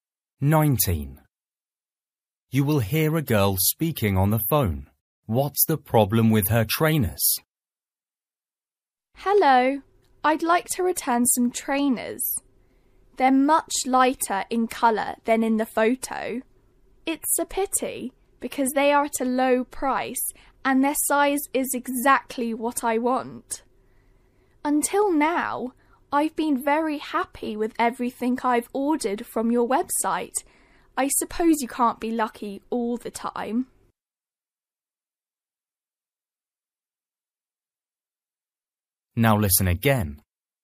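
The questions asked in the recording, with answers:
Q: What's the problem with her trainers?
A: They are much lighter in colour than in the photo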